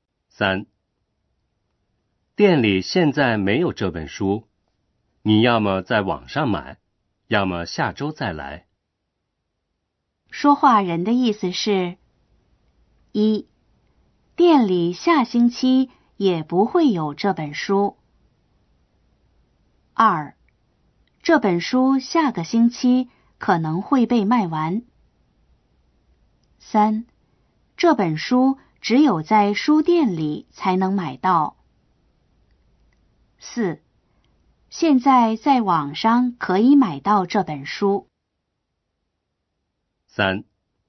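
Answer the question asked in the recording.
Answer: 4: 现在在网上可以买到这本书。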